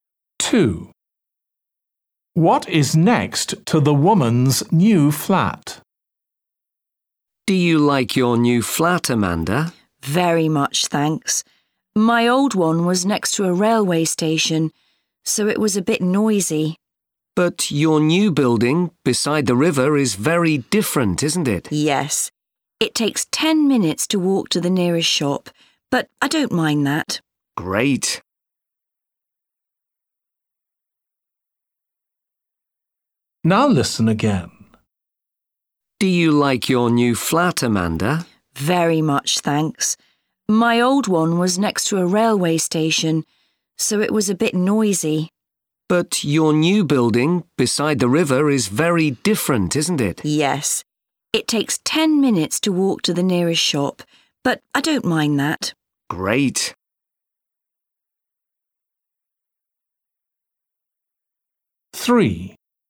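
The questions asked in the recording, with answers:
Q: What is next to the woman's new flat?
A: A river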